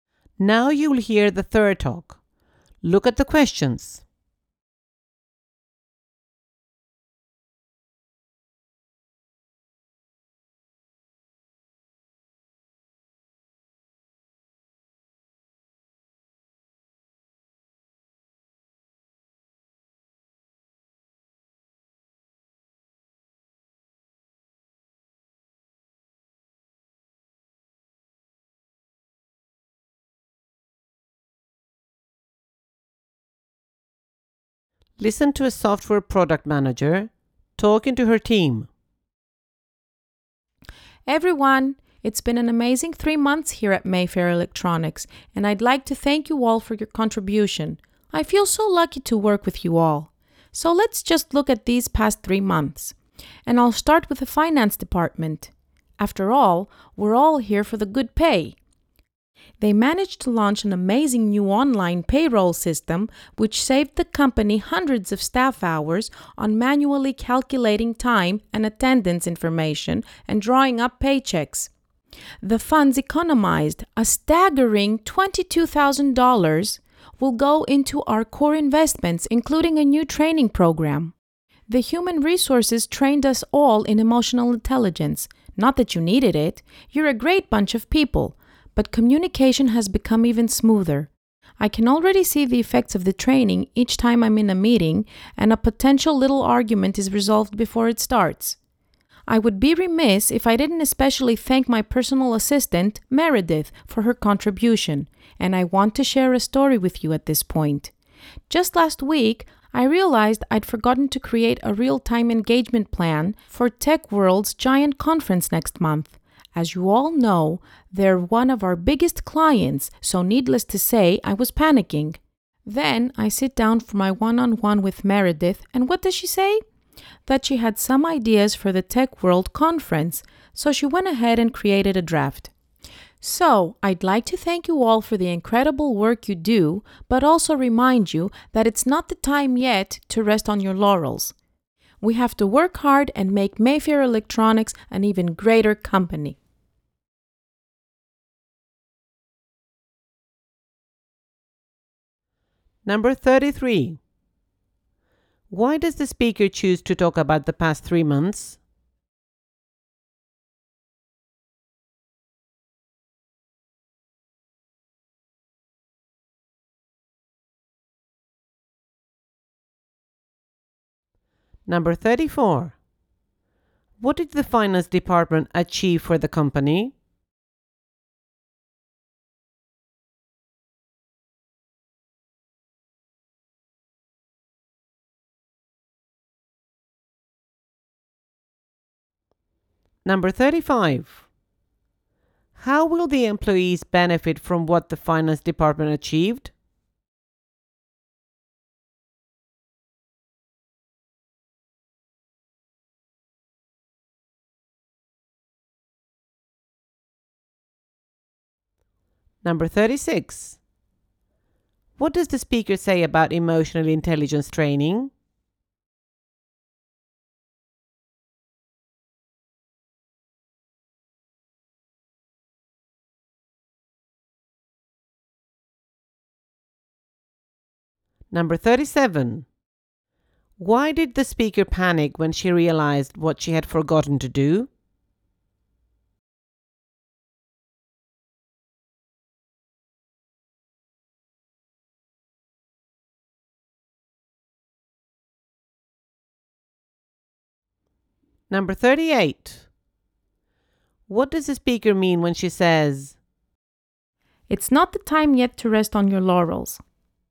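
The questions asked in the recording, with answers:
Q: What did the finance department achieve for the company?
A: It launched a new online payroll system that saved staff hours and $22,000

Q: How will the employees benefit from what the finance department achieved?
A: The savings will fund a new training program

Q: What does the speaker say about emotional intelligence training?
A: Communication has become even smoother

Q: Why did the speaker panic when she realized what she had forgotten to do?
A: Tech World is one of their biggest clients

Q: What does the speaker mean when she says,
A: They must keep working hard rather than relax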